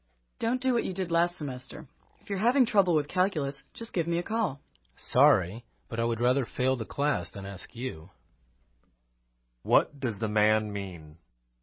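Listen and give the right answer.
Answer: He would rather fail the calculus class than ask the woman for help.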